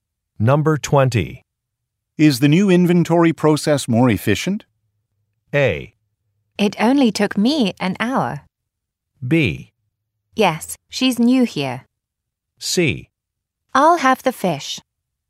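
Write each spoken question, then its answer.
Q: Is the new inventory process more efficient?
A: A: It only took me an hour.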